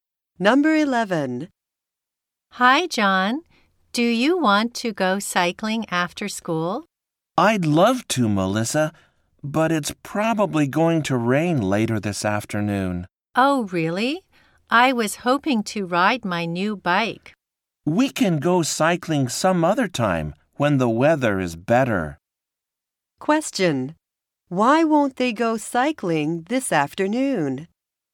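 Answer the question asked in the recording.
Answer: It will probably rain.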